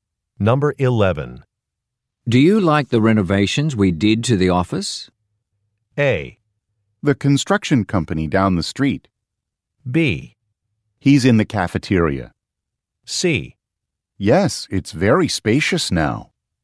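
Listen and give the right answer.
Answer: C: Yes, it's very spacious now.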